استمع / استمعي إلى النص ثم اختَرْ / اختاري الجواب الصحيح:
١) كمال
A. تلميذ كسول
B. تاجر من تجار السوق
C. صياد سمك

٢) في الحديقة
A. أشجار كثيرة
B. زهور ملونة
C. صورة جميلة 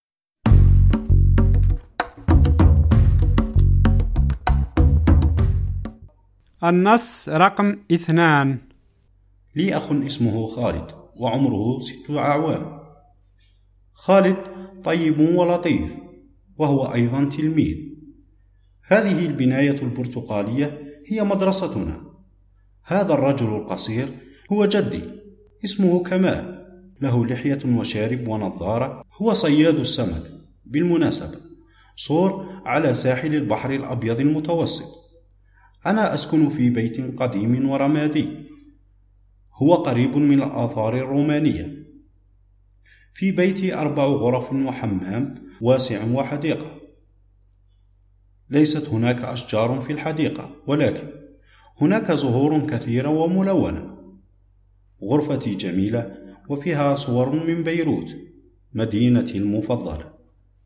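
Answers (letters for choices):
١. C
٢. B

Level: المستوى الأول – الدرجة الأولى (A1)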